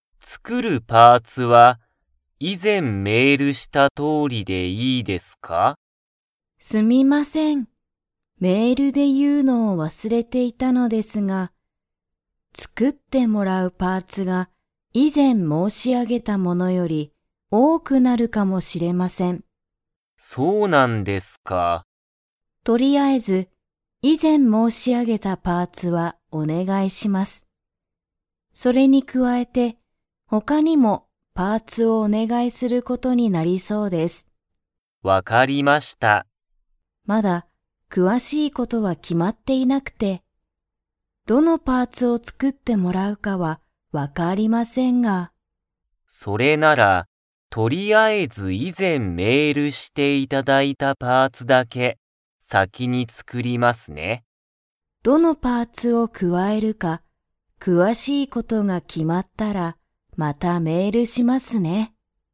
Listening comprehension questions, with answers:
北浜きたはまさんは、何なにが詳くわしく決きまっていないと言いっていますか?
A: どのパーツを加くわえるか

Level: Level 3